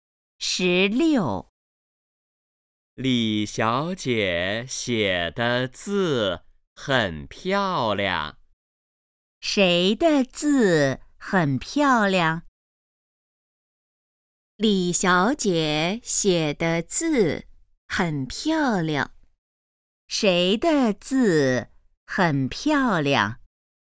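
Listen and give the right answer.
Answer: 李小姐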